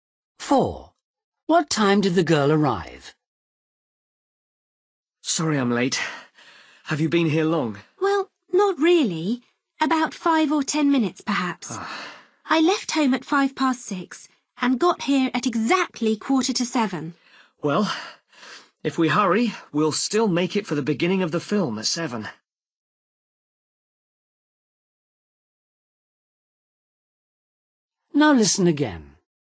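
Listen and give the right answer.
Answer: 6:45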